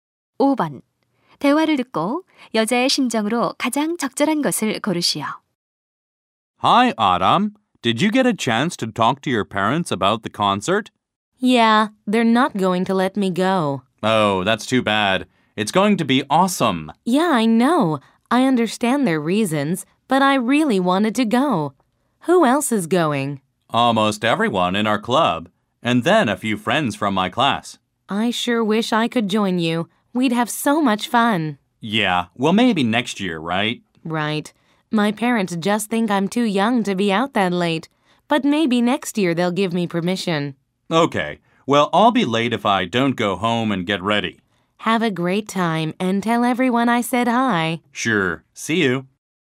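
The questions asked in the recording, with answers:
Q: 대화를 듣고 여자의 심정으로 가장 적절한 것을 고르시오.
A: 실망스러움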